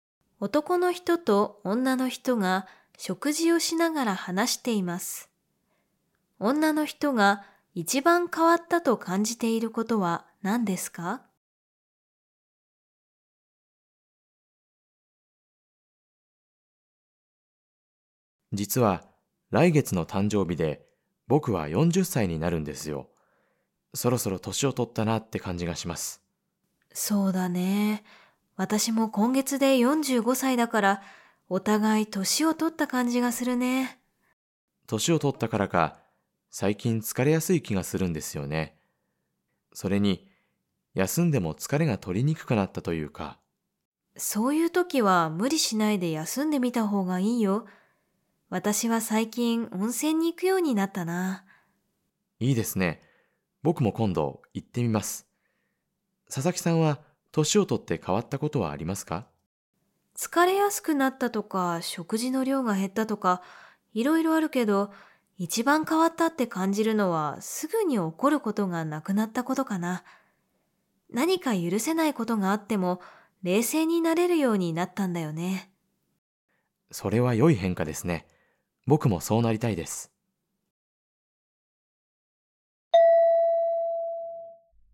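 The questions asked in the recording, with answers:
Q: 女の人が一番変わったと感じていることは何ですか?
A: すぐに怒らなくなったこと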